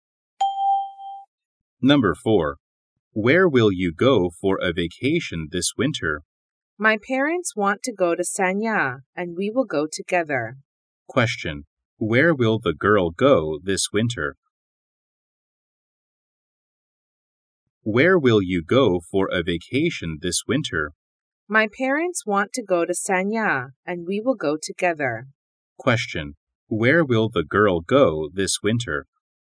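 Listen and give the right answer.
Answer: Sanya.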